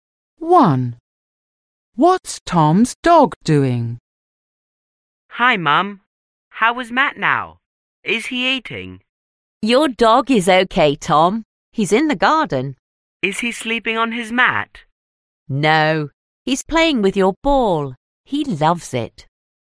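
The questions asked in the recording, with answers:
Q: What's Tom's dog doing?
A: Playing with Tom's ball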